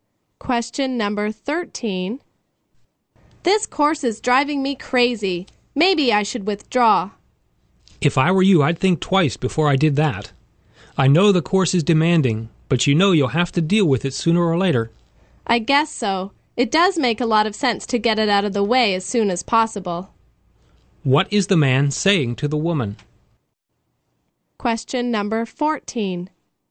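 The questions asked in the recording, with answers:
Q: What is the man saying to the woman?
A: She should not drop the course.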